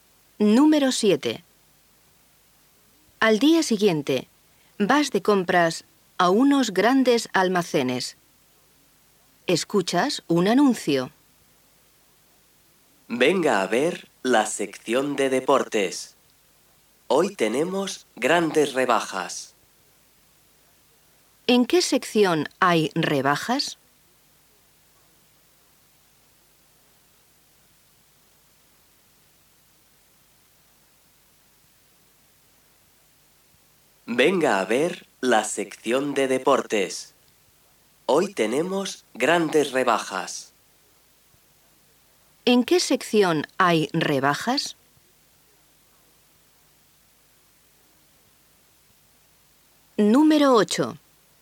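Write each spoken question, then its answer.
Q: ¿En qué sección hay rebajas?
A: En la sección de deportes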